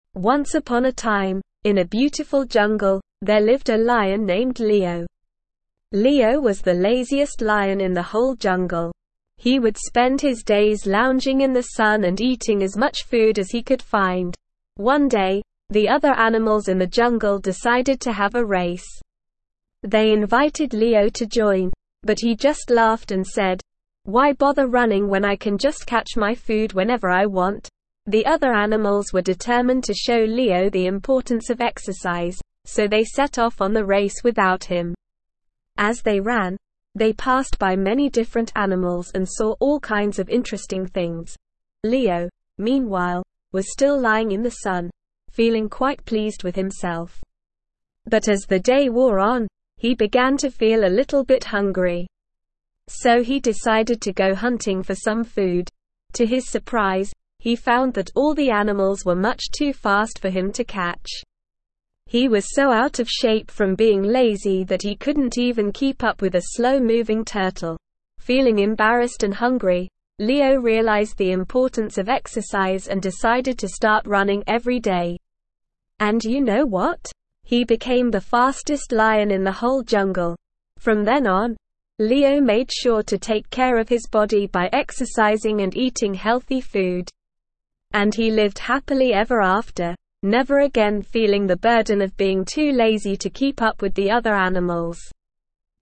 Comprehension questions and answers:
Please fill in the gaps.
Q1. The lazy lion's name was __________.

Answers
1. Leo

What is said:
Once upon a time, in a beautiful jungle, there lived a lion named Leo. Leo was the laziest lion in the whole jungle. He would spend his days lounging in the sun and eating as much food as he could find.
One day, the other animals in the jungle decided to have a race. They invited Leo to join, but he just laughed and said, "Why bother running when I can just catch my food whenever I want?"
The other animals were determined to show Leo the importance of exercise, so they set off on the race without him. As they ran, they passed by many different animals and saw all kinds of interesting things.
Leo, meanwhile, was still lying in the sun, feeling quite pleased with himself. But as the day wore on, he began to feel a little bit hungry. So he decided to go hunting for some food.
To his surprise, he found that all the animals were much too fast for him to catch. He was so out of shape from being lazy that he couldn't even keep up with a slow-moving turtle!
Feeling embarrassed and hungry, Leo realized the importance of exercise and decided to start running every day. And you know what? He became the fastest lion in the whole jungle!
From then on, Leo made sure to take care of his body by exercising and eating healthy food. And he lived happily ever after, never again feeling the burden of being too lazy to keep up with the other animals.

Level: Level 1